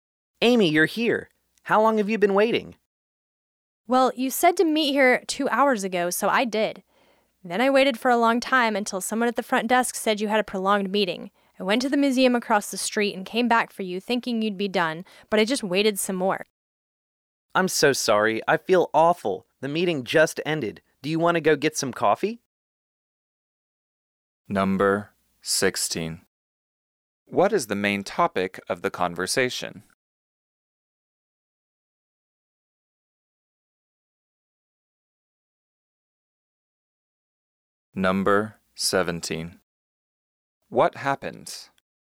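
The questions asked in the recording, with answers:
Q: What is the main topic of the conversation?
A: Amy waiting a long time for the man, whose meeting ran late

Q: What happens?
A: The man's meeting ran long, so Amy waited for two hours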